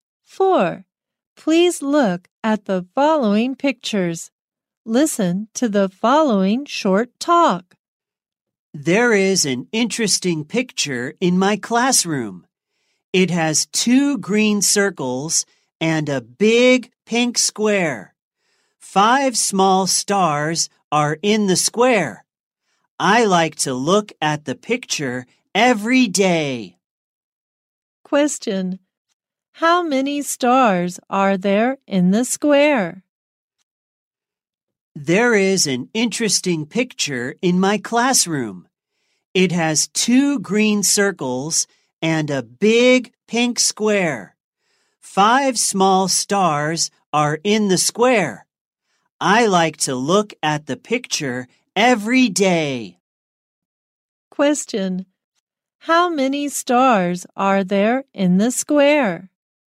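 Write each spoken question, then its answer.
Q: How many stars are there in the square?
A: Five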